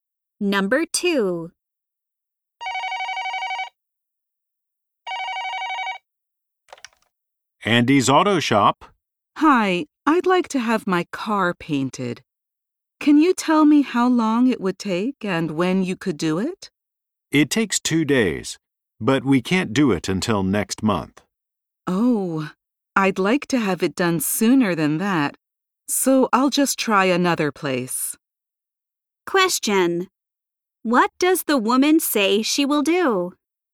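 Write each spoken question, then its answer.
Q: What does the woman say she will do?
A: Try another place to get her car painted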